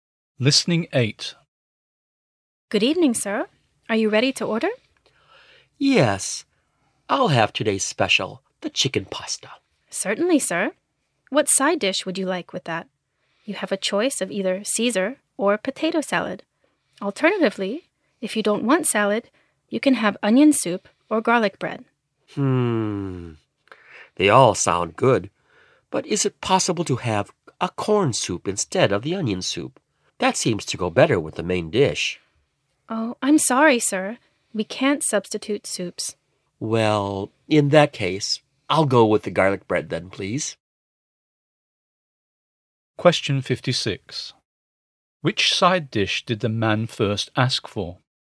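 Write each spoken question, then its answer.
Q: Which side dish did the man first ask for?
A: Corn soup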